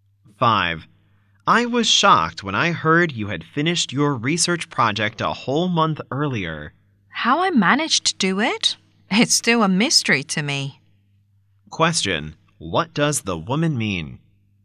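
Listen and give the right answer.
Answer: She doesn't know how she managed to finish it so early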